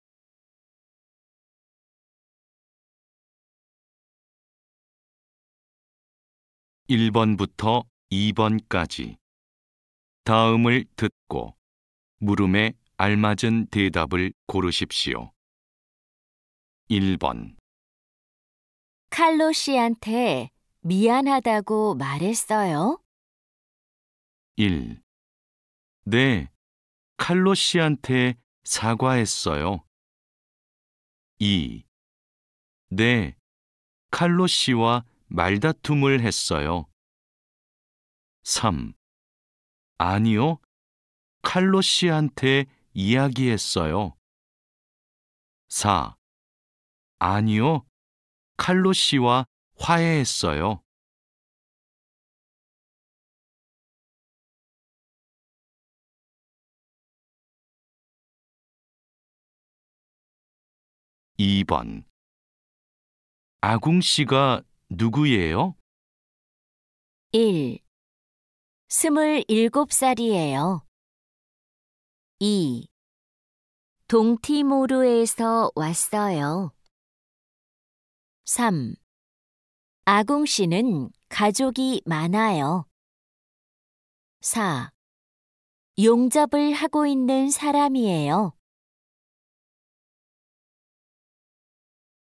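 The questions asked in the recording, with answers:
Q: 칼로 씨한테 미안하다고 말했어요?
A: 1: 네, 칼로 씨한테 사과했어요.

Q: 아궁 씨가 누구예요?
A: 4: 용접을 하고 있는 사람이에요.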